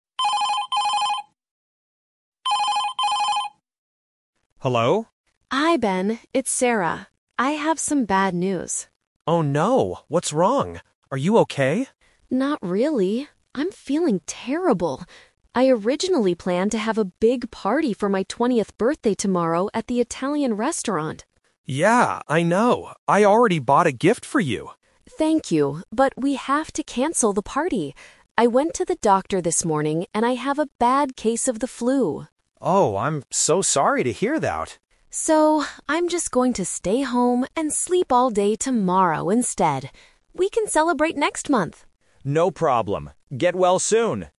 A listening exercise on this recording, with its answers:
Listen to a telephone conversation between two friends. For each question, choose the correct answer (A, B, or C).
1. Why is Sarah calling Ben?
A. To invite him to a restaurant.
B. To cancel her birthday party.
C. To thank him for a gift.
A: To cancel her birthday party.

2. What did Sarah do this morning?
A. She went to the doctor.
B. She bought a birthday gift.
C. She went to an Italian restaurant.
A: She went to the doctor.

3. What is Sarah actually going to do tomorrow?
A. Have a big party.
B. Sleep all day.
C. Celebrate with her friends.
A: Sleep all day.

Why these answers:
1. Sarah calls to say she has "bad news" and tells Ben, "we have to cancel the party" (Option B - Key). Option A is a trap because she mentions the Italian restaurant, but the party there is cancelled. Option C is a trap; Ben mentions a gift, but thanking him is not the main reason she called.
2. Sarah explicitly states, "I went to the doctor this morning" (Option A - Key). Option B is a trap because Ben is the one who bought a gift. Option C is a trap because the restaurant was the plan for tomorrow, not where she went this morning.
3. Sarah says she "originally planned to have a big party" (Option A - Trap). However, because she has the flu, she changes her plan and says, "So, I'm just going to stay home and sleep all day tomorrow instead" (Option B - Key). Option C is a trap because they will celebrate "next month," not tomorrow.

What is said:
Ben: Hello?
Sarah: Hi Ben, it's Sarah. I have some bad news.
Ben: Oh no, what's wrong? Are you okay?
Sarah: Not really. I'm feeling terrible. I originally planned to have a big party for my 20th birthday tomorrow at the Italian restaurant.
Ben: Yeah, I know. I already bought a gift for you!
Sarah: Thank you, but we have to cancel the party. I went to the doctor this morning and I have a bad case of the flu.
Ben: Oh, I'm so sorry to hear that.
Sarah: So, I'm just going to stay home and sleep all day tomorrow instead. We can celebrate next month.

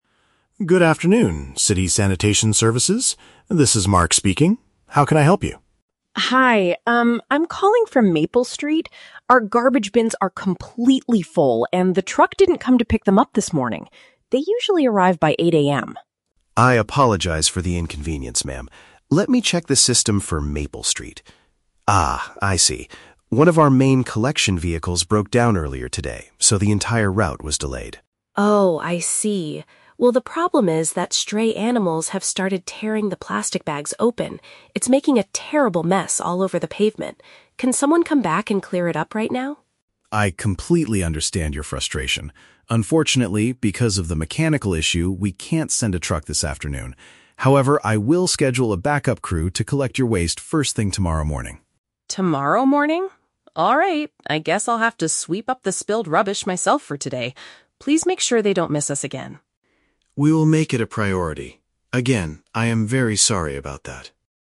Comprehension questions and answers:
Listen to the telephone conversation between a resident and a sanitation operator, then choose the correct answer (A, B, or C) for each question.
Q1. Why is the resident calling the sanitation department?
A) To request larger bins because hers are completely full.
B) To report that her household waste was not taken away.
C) To complain about the loud noise the trucks make at 8 AM.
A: To report that her household waste was not taken away.

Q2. What caused the delay in the neighborhood's service?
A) The garbage truck drivers could not find Maple Street.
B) A group of stray animals blocked the road.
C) One of the company's trucks had an engine failure.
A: One of the company's trucks had an engine failure.

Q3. How will the problem be resolved?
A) Another team will arrive early the next day to collect the trash.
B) A cleaning crew will be sent to wash the pavement this afternoon.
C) The resident will transport her rubbish to the center herself.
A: Another team will arrive early the next day to collect the trash.

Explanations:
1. The resident states that "the truck didn't come to pick them up this morning." Option (B) paraphrases this as "waste was not taken away." Option (A) is a trap; she says her bins are "completely full," but she is not asking for larger ones. Option (C) is a trap; 8 AM is the time they usually arrive, not a complaint about noise.
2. The operator explains that one of their "collection vehicles broke down," which is also referred to as a "mechanical issue." Option (C) uses the synonym "engine failure" for this problem. Option (B) is a trap; "stray animals" are mentioned, but they are making a mess with the trash, not blocking the road. Option (A) is plausible but not mentioned.
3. The operator promises to "schedule a backup crew to collect your waste first thing tomorrow morning." Option (A) uses paraphrasing ("Another team" for "backup crew", "early the next day" for "first thing tomorrow morning"). Option (B) is a trap; the resident asks for someone to clear it up "right now" (this afternoon), but the operator refuses. Option (C) is a trap; the resident says she will "sweep up the spilled rubbish," but she is not taking it to the center.

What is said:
Operator: Good afternoon, City Sanitation Services. This is Mark speaking. How can I help you?
Resident: Hi, um, I'm calling from Maple Street. Our garbage bins are completely full, and the truck didn't come to pick them up this morning. They usually arrive by 8 AM.
Operator: I apologize for the inconvenience, ma'am. Let me check the system for Maple Street... Ah, I see. One of our main collection vehicles broke down earlier today, so the entire route was delayed.
Resident: Oh, I see. Well, the problem is that stray animals have started tearing the plastic bags open. It's making a terrible mess all over the pavement. Can someone come back and clear it up right now?
Operator: I completely understand your frustration. Unfortunately, because of the mechanical issue, we can't send a truck this afternoon. However, I will schedule a backup crew to collect your waste first thing tomorrow morning.
Resident: Tomorrow morning? Alright, I guess I'll have to sweep up the spilled rubbish myself for today. Please make sure they don't miss us again.

